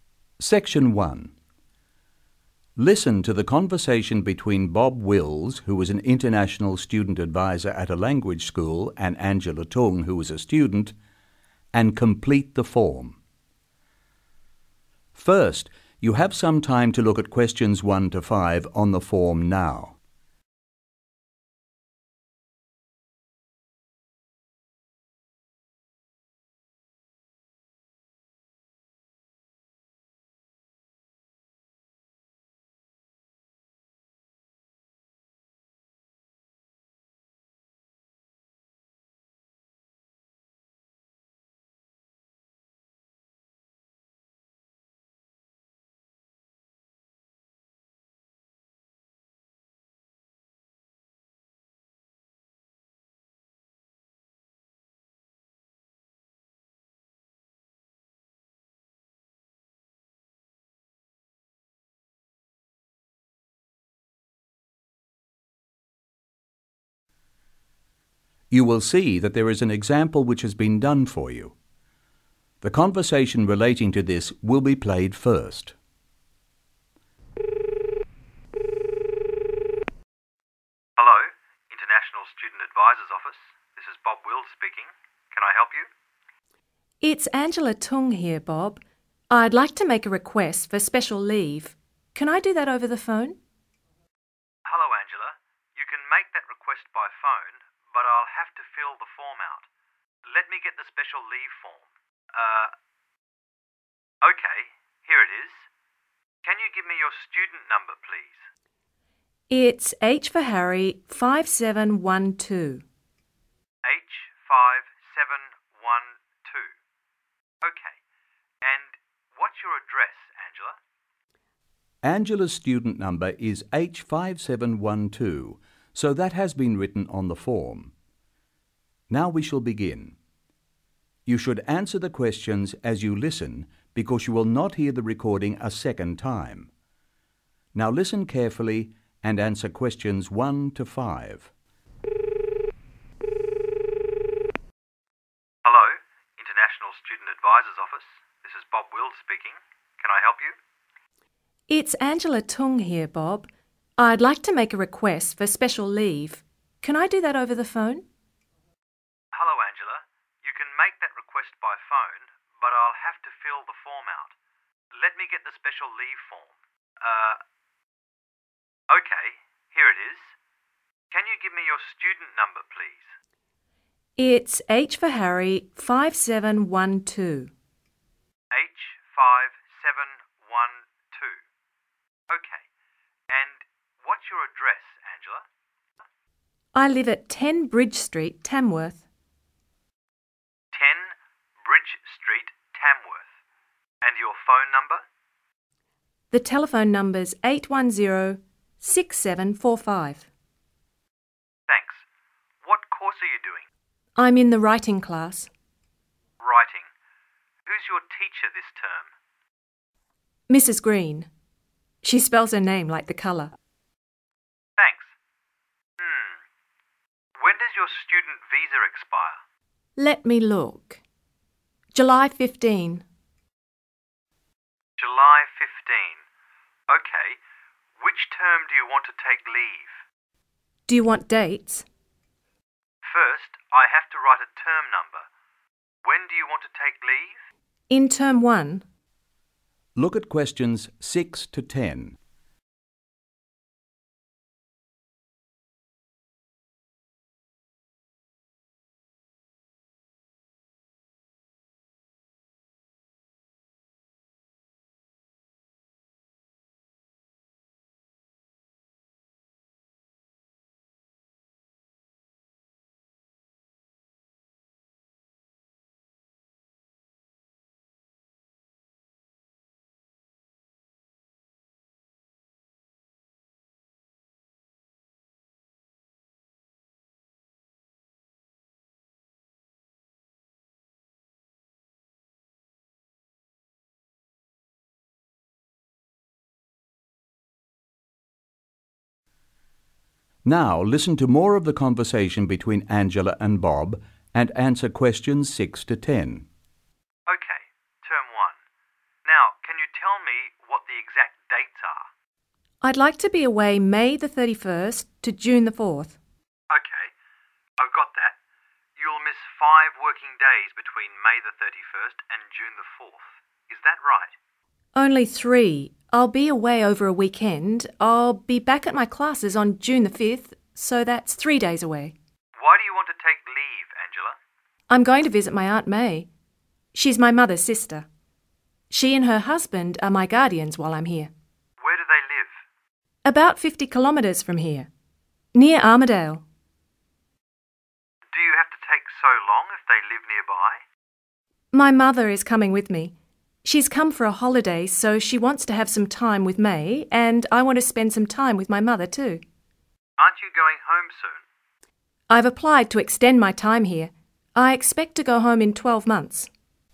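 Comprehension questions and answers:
Complete the form below Write NO MORE THAN THREE WORDS AND/OR A NUMBER for each answer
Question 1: Address (1)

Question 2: Telephone number (2)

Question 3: Teacher's name (3)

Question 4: Visa expiry date (4)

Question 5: Term (5)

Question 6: Leave dates (6)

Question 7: Absence (7)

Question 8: Reason (8)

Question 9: Distance (9)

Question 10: When leaving (10)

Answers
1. 10 Bridge Street, Tamworth
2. 810-6745
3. Mrs. Green
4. July 15
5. 1
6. May 31st to June 4th
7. 3
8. visit her aunt
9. 50 kilometres
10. in 12 months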